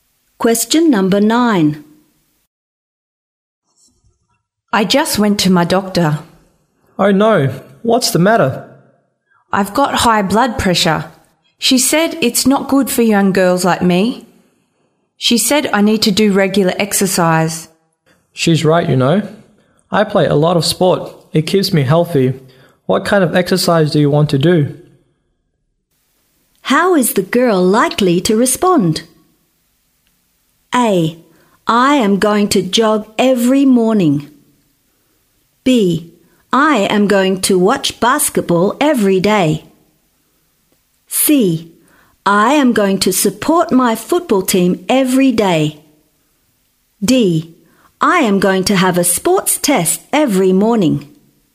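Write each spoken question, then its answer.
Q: How is the girl likely to respond?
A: A: I am going to jog every morning.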